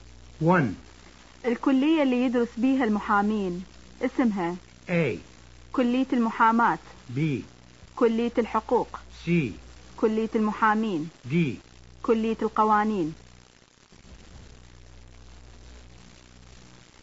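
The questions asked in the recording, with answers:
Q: الكلية اللي يدرس بيها المحامين اسمها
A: B: كلية الحقوق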